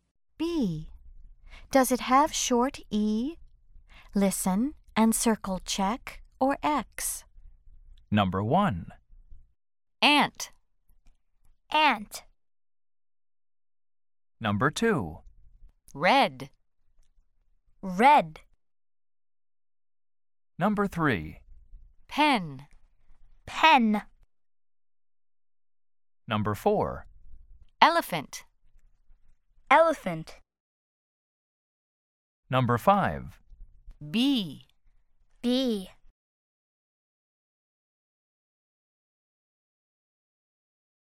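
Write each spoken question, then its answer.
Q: Elephant.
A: Yes (check)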